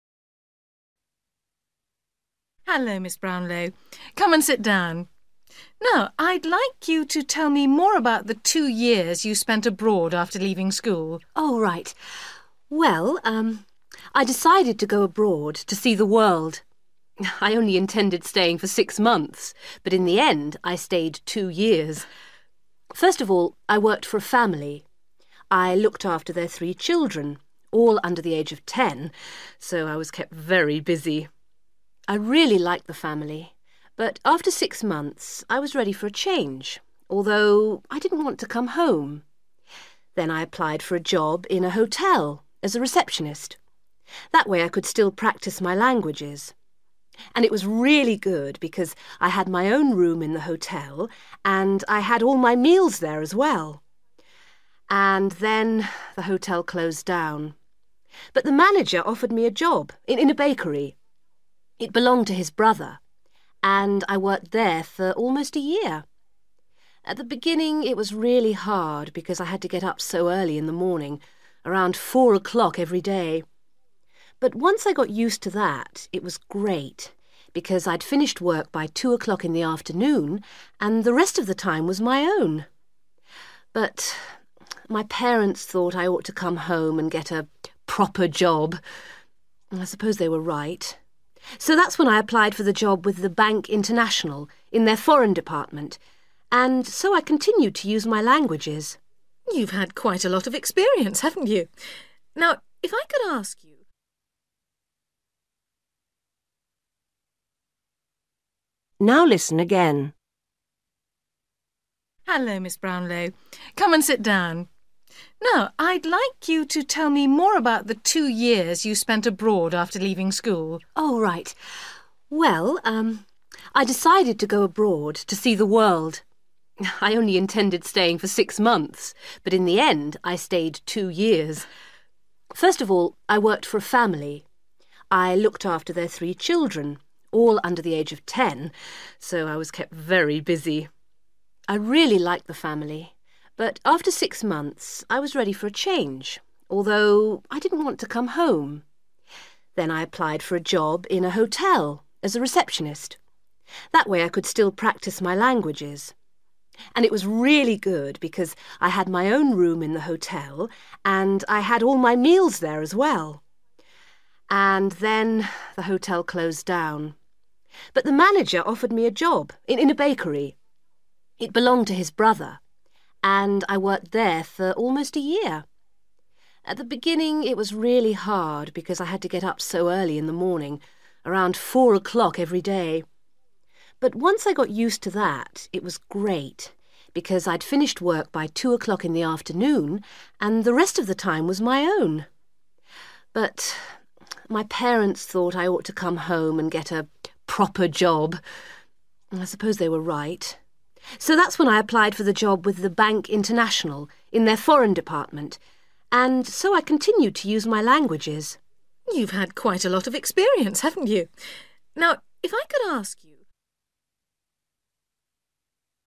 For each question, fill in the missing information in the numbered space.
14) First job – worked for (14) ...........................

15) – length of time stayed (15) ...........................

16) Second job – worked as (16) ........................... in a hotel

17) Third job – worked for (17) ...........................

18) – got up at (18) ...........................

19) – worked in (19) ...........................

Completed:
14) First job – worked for (a) family
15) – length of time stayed six/6 months
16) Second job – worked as (a) receptionist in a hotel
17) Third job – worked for (a) bakery / baker's
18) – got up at four / (0)4 / 4 o'clock / am / a.m. / in the morning
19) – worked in foreign / Foreign / Department / department / Desk / desk

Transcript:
Interviewer: Hello, Miss Brownlow, come and sit down. Now, I'd like you to tell me more about the two years you spent abroad after leaving school.
Woman: Oh, right. Well, I decided to go abroad to see the world. I only intended staying for six months but in the end I stayed two years. first of all I worked for a family. I looked after their three children – all under the age of ten so I was kept very busy! I really liked the family, but after six months I was ready for a change although I didn't want to come home. Then I applied for a job in a hotel as a receptionist. That way I could still practise my languages. And it was really good because I had my own room in the hotel and I had all my meals there as well. And then the hotel closed down! But the manager offered me a job – in a bakery – it belonged to his brother – and I worked there for almost a year. At the beginning it was really hard because I had to get up so early in the morning – around four o'clock every day. But once I got used to that, it was great, because I'd finished work by two o'clock in the afternoon and the rest of the time was my own. But my parents thought I ought to come home and get a 'proper job'. I suppose they were right. So that's when I applied for the job with the Bank International in their foreign department and so I continued to use my languages.
Interviewer: You've had quite a lot of experience, haven't you! Now, if I could ask you ...

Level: B1